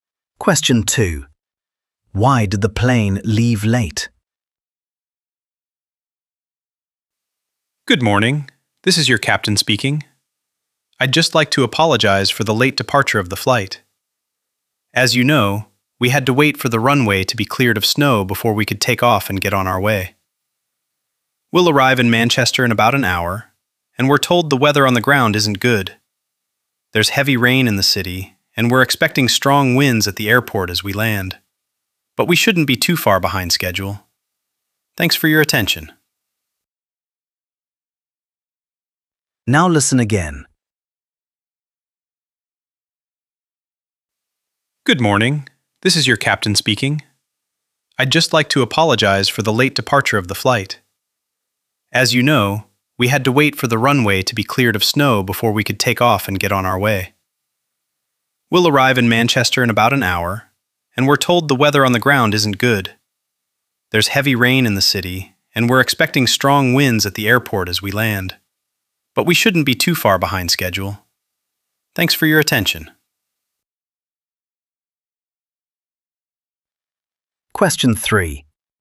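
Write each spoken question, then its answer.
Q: Why did the plane leave late?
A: Snow had to be cleared from the runway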